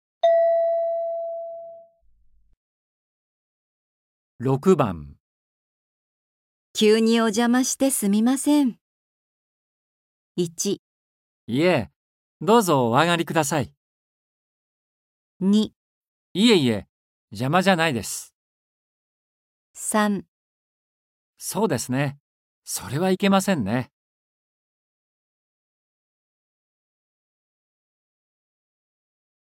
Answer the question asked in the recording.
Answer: 1

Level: N4.42